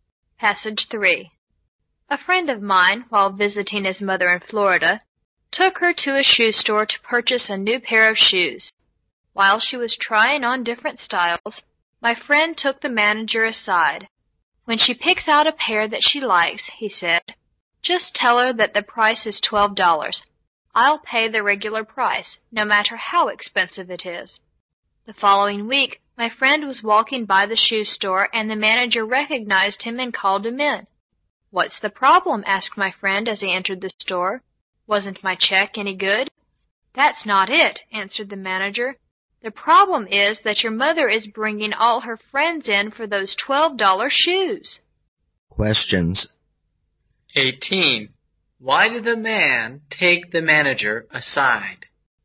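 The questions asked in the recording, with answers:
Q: Why did the man take the manager aside?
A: To ask him to tell his mother the shoes cost $12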